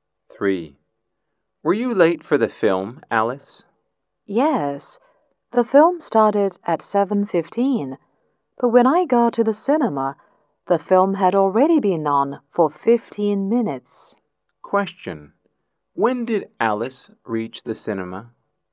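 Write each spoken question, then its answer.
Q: When did Alice reach the cinema?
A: At 7:30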